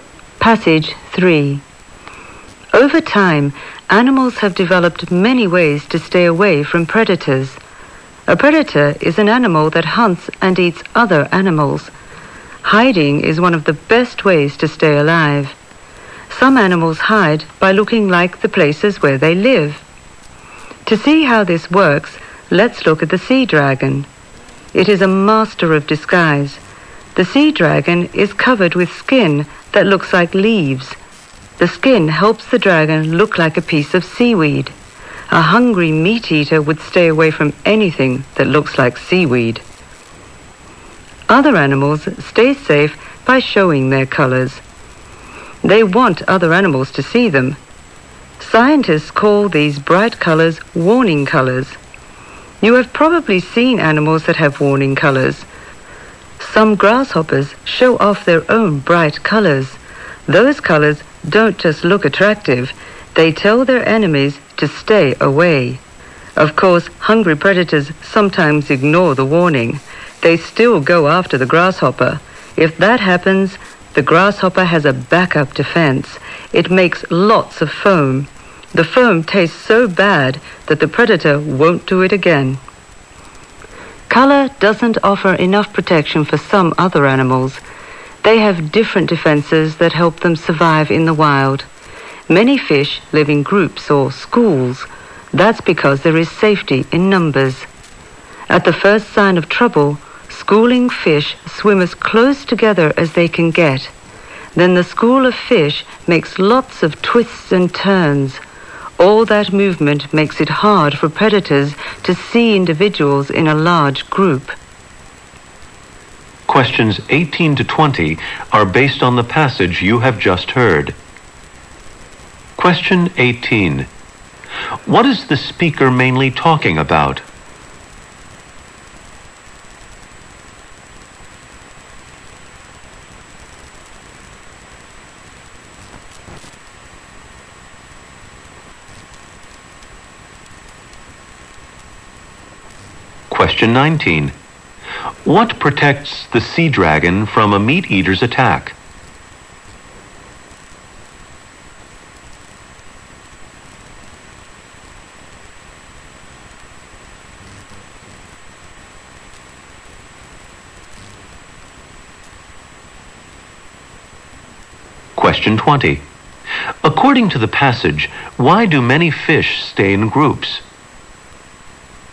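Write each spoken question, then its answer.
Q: What is the speaker mainly talking about?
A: How animals protect themselves from predators.

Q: What protects the sea dragon from a meat eater's attack?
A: Its leaf-like skin makes it look like seaweed.

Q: According to the passage, why do many fish stay in groups?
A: There is safety in numbers; predators can't pick out individuals.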